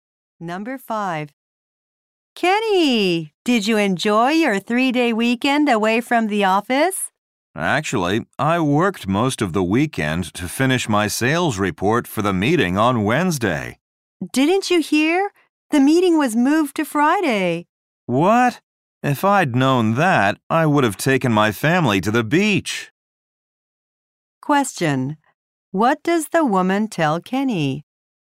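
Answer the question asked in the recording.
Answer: The meeting was moved to Friday.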